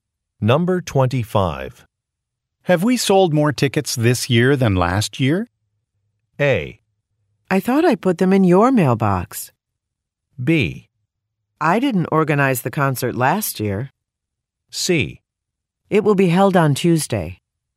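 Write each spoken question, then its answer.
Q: Have we sold more tickets this year than last year?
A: B: I didn't organize the concert last year.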